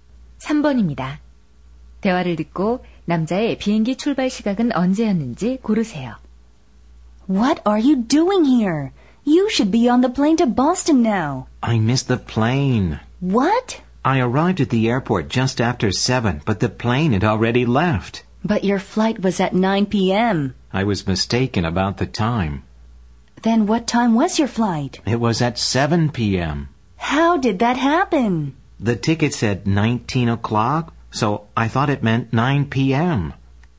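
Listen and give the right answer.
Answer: 오후 7시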